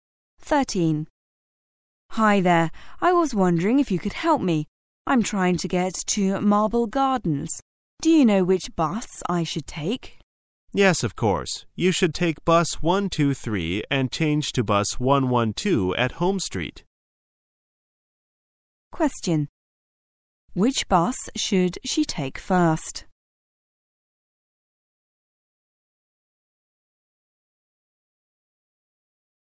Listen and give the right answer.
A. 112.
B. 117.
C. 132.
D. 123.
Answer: D. 123.

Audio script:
[解析] W: Hi there. I was wondering if you could help me. I'm trying to get to Marble Gar dens. Do you know which bus I should take? M: Yes, of course. You should take bus 123 and change to bus 112 at Homes Street. Q: Which bus should she take first?